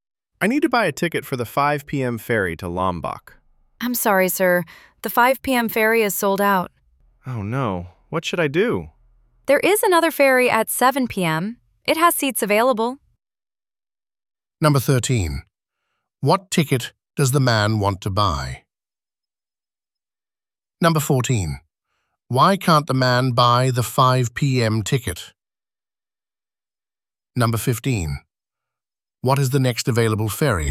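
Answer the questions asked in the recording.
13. A ticket for the 5 p.m. ferry to Lombok
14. The 5 p.m. ferry is sold out
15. The 7 p.m. ferry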